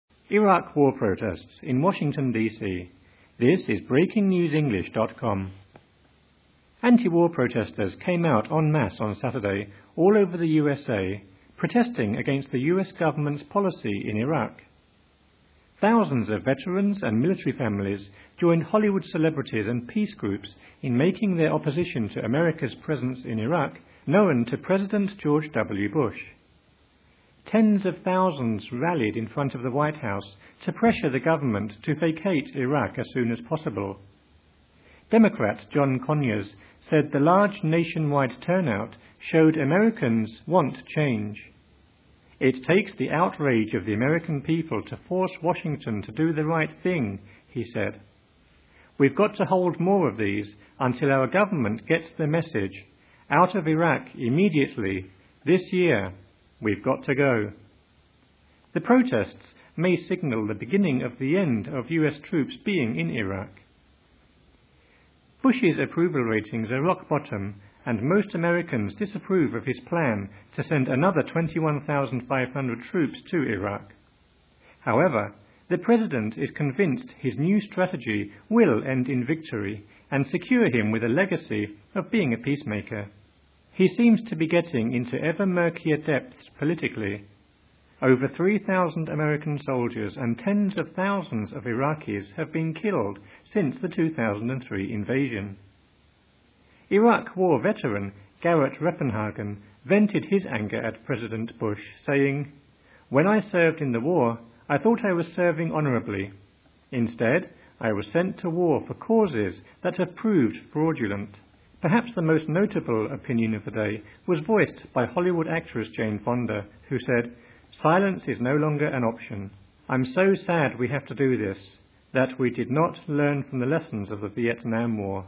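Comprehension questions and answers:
Listen and fill in the spaces.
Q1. Anti-war protestors came _______________ Saturday all over the USA, protesting against the US government's policy in Iraq.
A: out en masse on

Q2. Thousands of veterans and military families joined Hollywood celebrities and peace groups in making their opposition to America's _______________ to President George W. Bush.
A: presence in Iraq known

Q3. Democrat John Conyers said the large _______________ showed Americans want change:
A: nationwide turnout

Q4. The protests may signal _______________ of US troops being in Iraq.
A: the beginning of the end

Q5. Bush's _______________ and most Americans disapprove of his plan to send another 21,500 troops to Iraq.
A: approval ratings are rock bottom

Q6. However, the President is convinced his new strategy will end in victory and _______________ of being a peacemaker.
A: secure him with a legacy

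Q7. He seems to be getting into _______________ politically.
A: ever-murkier depths

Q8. When I served in the war, I thought I was _______________.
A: serving honorably

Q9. Instead, I was sent to war for causes that have _______________.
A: proved fraudulent

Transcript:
Iraq War protests in Washington DC
Anti-war protestors came out en masse on Saturday all over the USA, protesting against the US government's policy in Iraq. Thousands of veterans and military families joined Hollywood celebrities and peace groups in making their opposition to America's presence in Iraq known to President George W. Bush. Tens of thousands rallied in front of the White House to pressure the government to vacate Iraq as soon as possible. Democrat John Conyers said the large nationwide turnout showed Americans want change: "It takes the...outrage of the American people to force Washington to do the right thing," he said. 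"We've got to hold more of these ... until our government gets the message. Out of Iraq immediately. This year. We've got to go." The protests may signal the beginning of the end of US troops being in Iraq.
Bush's approval ratings are rock bottom and most Americans disapprove of his plan to send another 21,500 troops to Iraq. However, the President is convinced his new strategy will end in victory and secure him with a legacy of being a peacemaker. He seems to be getting into ever-murkier depths politically. Over 3,000 American soldiers and tens of thousands of Iraqis have been killed since the 2003 invasion. Iraq War veteran Garett Reppenhagen vented his anger at President Bush, saying: "When I served in the war, I thought I was serving honorably. Instead, I was sent to war for causes that have proved fraudulent." Perhaps the most notable opinion of the day was voiced by Hollywood actress Jane Fonda who said: "Silence is no longer an option...I'm so sad we have to do this -- that we did not learn from the lessons of the Vietnam War."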